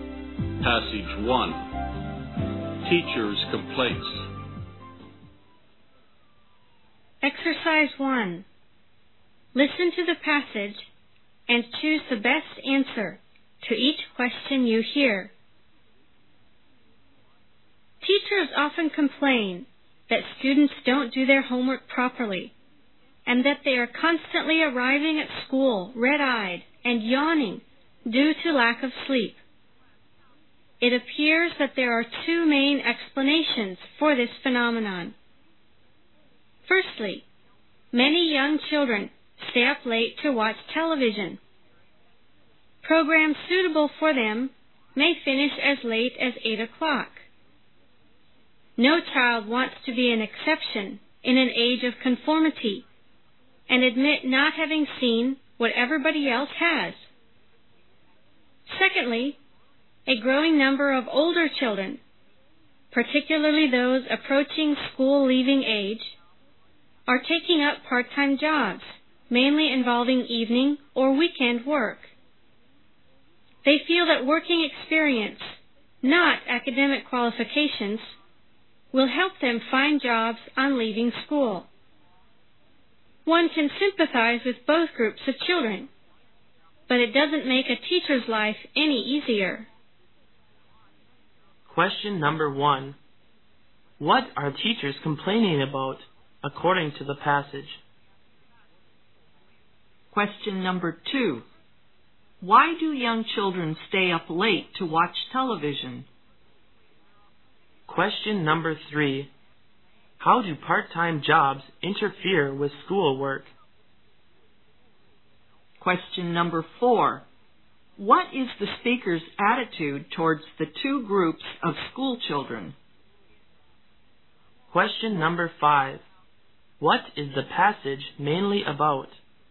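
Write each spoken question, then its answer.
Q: What are teachers complaining about, according to the passage?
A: Students don't do their homework properly and arrive at school tired from lack of sleep

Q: Why do young children stay up late to watch television?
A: No child wants to be an exception and admit not having seen what everybody else has

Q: What is the speaker's attitude towards the two groups of school children?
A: Sympathetic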